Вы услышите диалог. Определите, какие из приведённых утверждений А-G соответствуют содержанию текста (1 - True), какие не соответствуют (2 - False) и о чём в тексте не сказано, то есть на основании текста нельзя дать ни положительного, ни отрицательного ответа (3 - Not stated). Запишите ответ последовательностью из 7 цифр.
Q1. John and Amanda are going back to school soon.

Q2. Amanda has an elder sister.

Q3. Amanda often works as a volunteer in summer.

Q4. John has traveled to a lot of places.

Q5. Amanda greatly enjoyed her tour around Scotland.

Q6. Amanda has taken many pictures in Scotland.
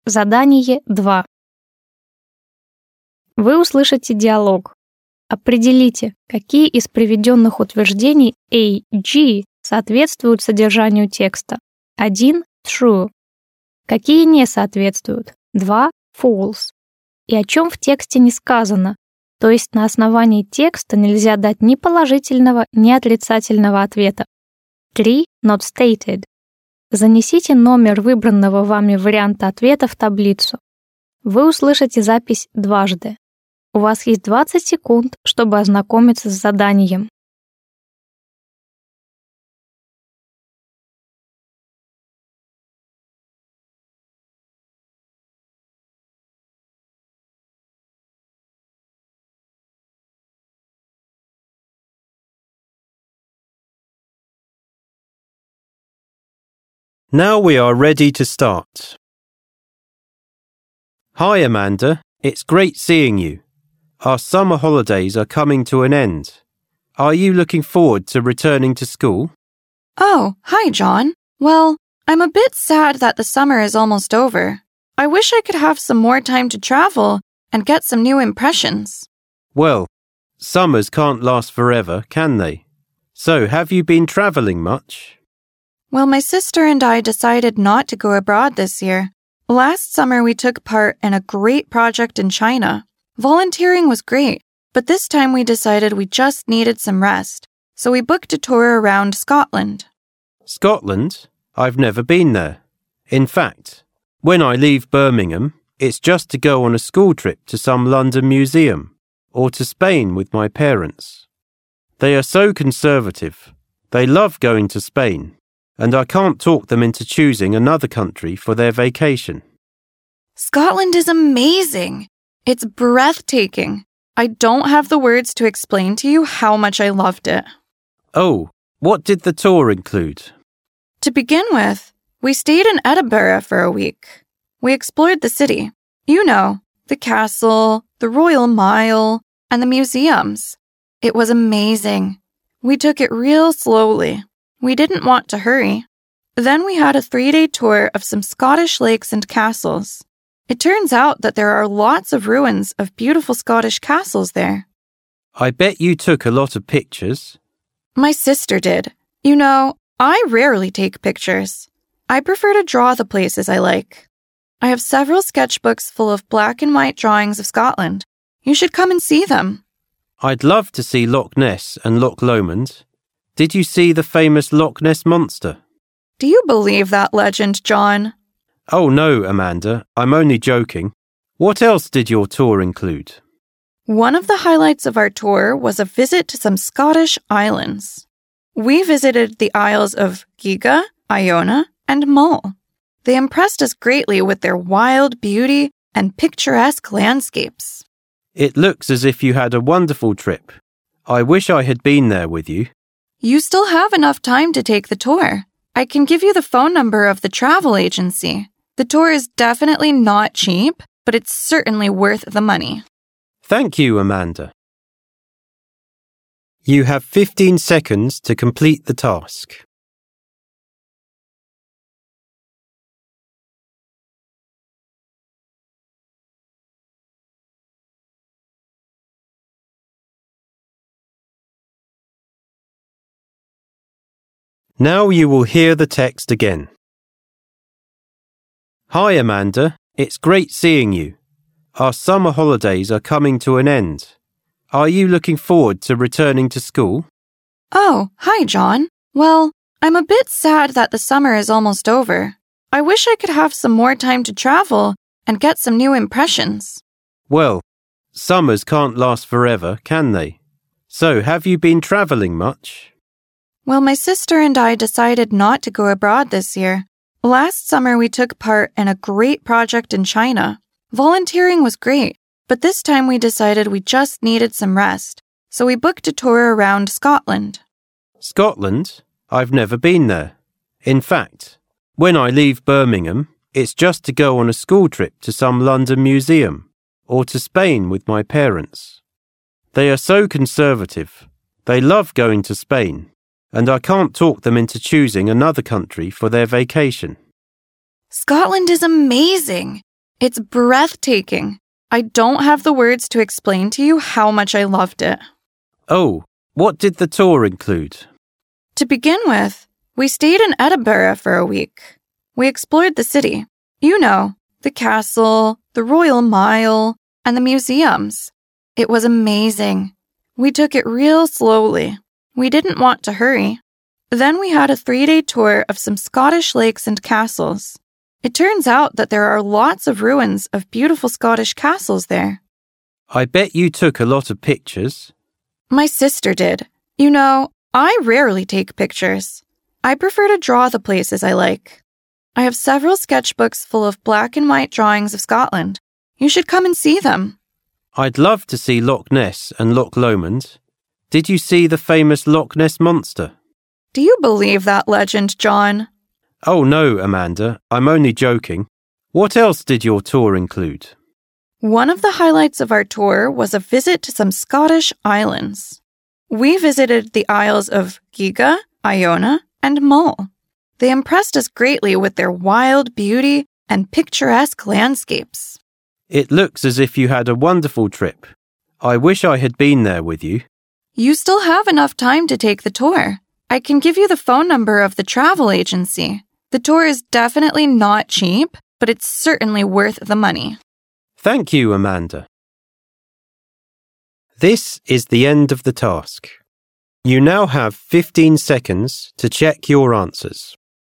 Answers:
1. True
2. Not stated
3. Not stated
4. False
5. True
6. False

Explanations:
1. Amanda: Oh, hi John. Well, I'm a bit sad that the summer is almost over.
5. Amanda: Scotland is amazing. It's breathtaking. I don't have the words to explain to you how much I loved it.
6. John: I bet you took a lot of pictures. Amanda: My sister did. You know, I rarely take pictures.

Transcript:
John: Hi Amanda, it's great seeing you. Our summer holidays are coming to an end. Are you looking forward to returning to school?
Amanda: Oh, hi John. Well, I'm a bit sad that the summer is almost over. I wish I could have some more time to travel and get some new impressions.
John: Well, summers can't last forever, can they? So have you been travelling much?
Amanda: Well, my sister and I decided not to go abroad this year. Last summer we took part in a great project in China. Volunteering was great, but this time we decided we just needed some rest, so we booked a tour around Scotland.
John: Scotland? I've never been there. In fact, when I leave Birmingham, it's just to go on a school trip to some London museum, or to Spain with my parents. They are so conservative. They love going to Spain, and I can't talk them into choosing another country for their vacation.
Amanda: Scotland is amazing! It's breathtaking. I don't have the words to explain to you how much I loved it.
John: Oh, what did the tour include?
Amanda: To begin with, we stayed in Edinburgh for a week. We explored the city — you know, the castle, the Royal Mile, and the museums. It was amazing. We took it really slowly. We didn't want to hurry. Then we had a three-day tour of some Scottish lakes and castles. It turns out that there are lots of ruins of beautiful Scottish castles there.
John: I bet you took a lot of pictures.
Amanda: My sister did. You know, I rarely take pictures. I prefer to draw the places I like. I have several sketchbooks full of black and white drawings of Scotland. You should come and see them.
John: I'd love to see Loch Ness and Loch Lomond. Did you see the famous Loch Ness Monster?\
Amanda: Do you believe that legend, John?
John: Oh no, Amanda. I'm only joking. What else did your tour include?
Amanda: One of the highlights of our tour was a visit to some Scottish islands. We visited the isles of Giga, Iona and Mull. They impressed us greatly with their wild beauty and picturesque landscapes.
John: It looks as if you had a wonderful trip. I wish I had been there with you.
Amanda: You still have enough time to take the tour. I can give you the phone number of the travel agency.
Amanda: The tour is definitely not cheap, but it's certainly worth the money.
Вы услышите диалог.